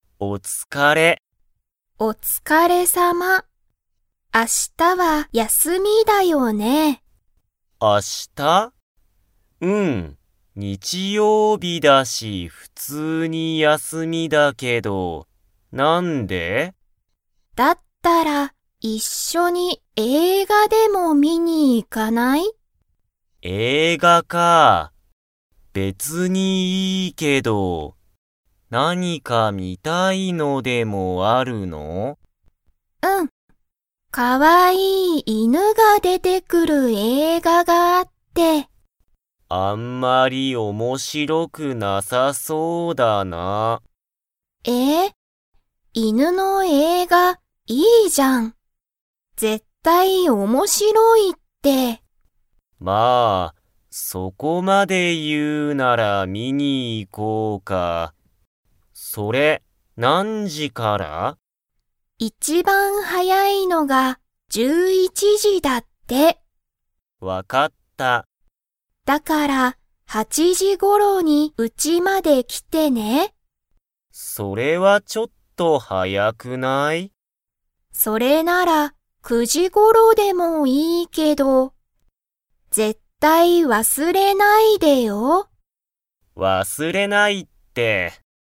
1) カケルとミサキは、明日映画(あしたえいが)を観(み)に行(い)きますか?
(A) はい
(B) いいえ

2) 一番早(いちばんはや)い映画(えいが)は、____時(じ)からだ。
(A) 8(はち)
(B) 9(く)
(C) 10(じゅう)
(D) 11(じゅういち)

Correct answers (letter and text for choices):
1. (A) はい
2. (D) 11(じゅういち)

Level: Level 2